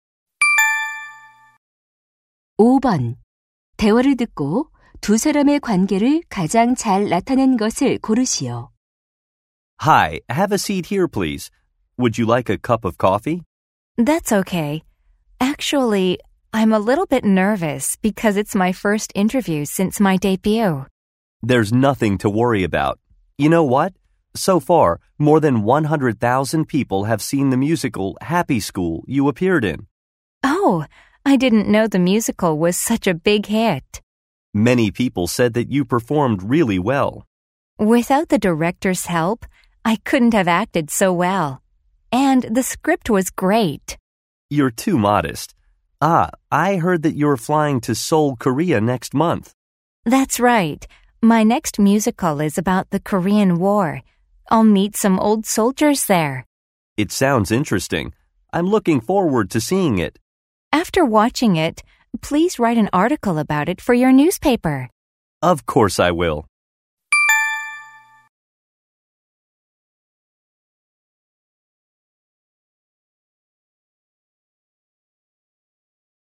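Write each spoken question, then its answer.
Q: 두 사람의 관계를 가장 잘 나타낸 것을 고르시오.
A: 신문 기자 - 뮤지컬 배우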